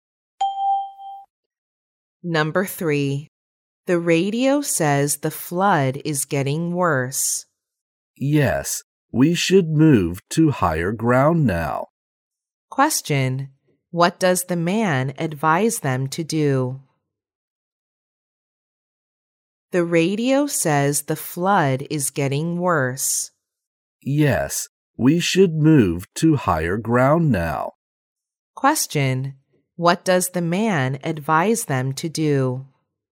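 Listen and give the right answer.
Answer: Move to higher ground now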